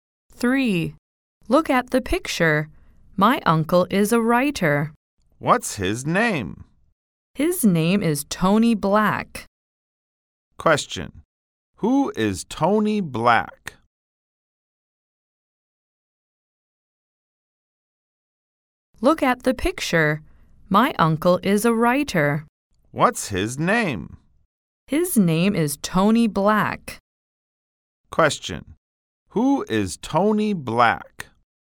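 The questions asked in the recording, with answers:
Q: Question.Who is Tony Black?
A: The speaker's uncle, a writer.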